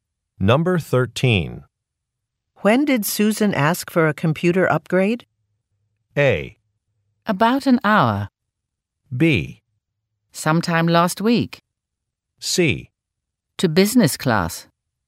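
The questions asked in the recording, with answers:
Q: When did Susan ask for a computer upgrade?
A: B: Sometime last week.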